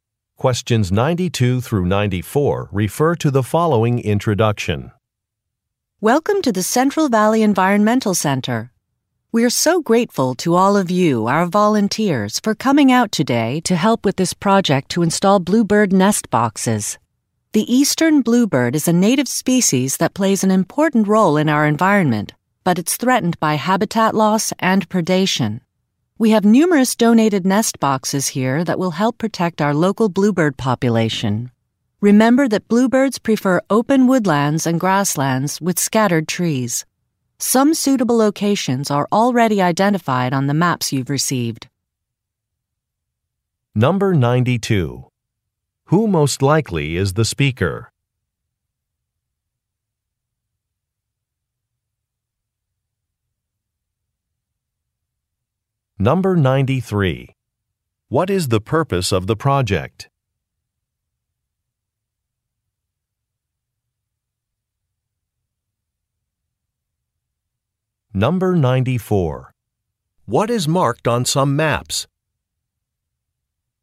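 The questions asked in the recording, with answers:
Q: Who most likely is the speaker?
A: An employee of an environmental center

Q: What is the purpose of the project?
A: To protect the local bluebird population

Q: What is marked on some maps?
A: Suitable locations for nest boxes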